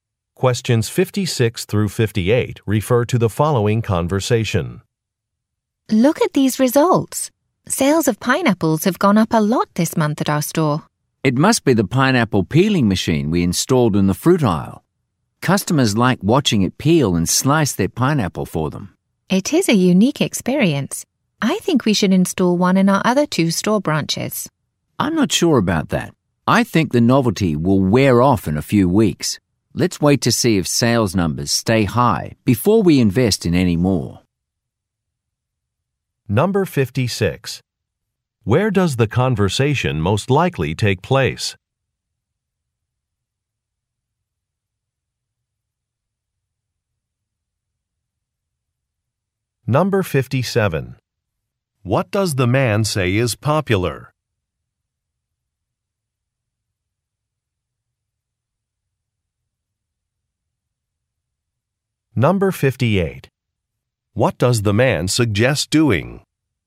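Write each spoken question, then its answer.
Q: Where does the conversation most likely take place?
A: At a grocery store

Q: What does the man say is popular?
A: The pineapple peeling machine

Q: What does the man suggest doing?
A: Installing machines in the other two stores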